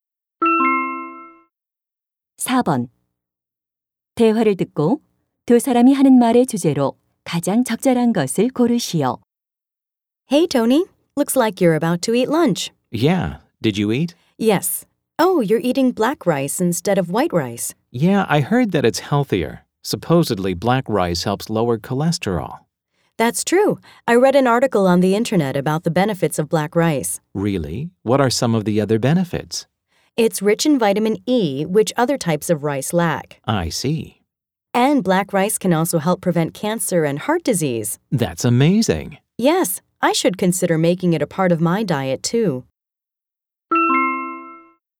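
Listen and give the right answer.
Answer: 흑미의 건강상 이점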